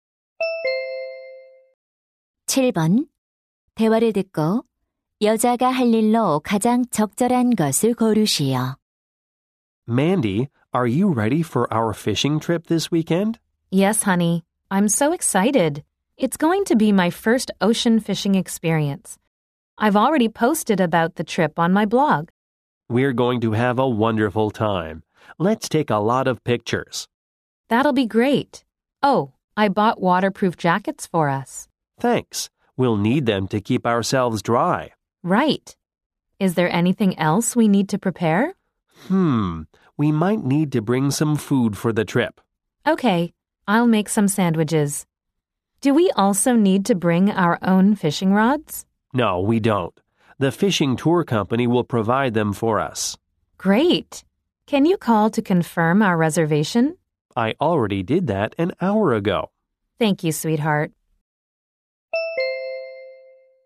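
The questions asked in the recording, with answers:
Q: 대화를 듣고 여자가 할 일로 가장 적절한 것을 고르시오.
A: 샌드위치 만들기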